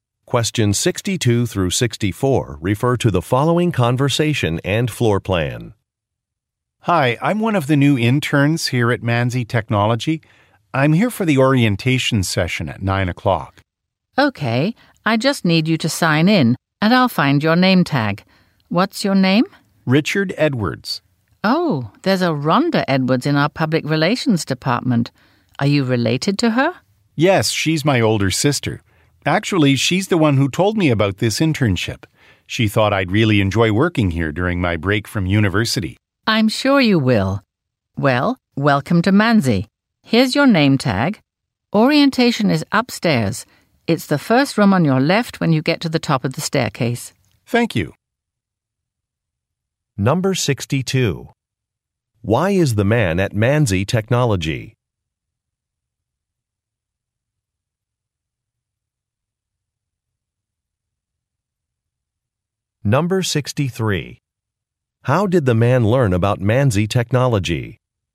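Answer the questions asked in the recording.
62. To attend an orientation session for new interns
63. From his older sister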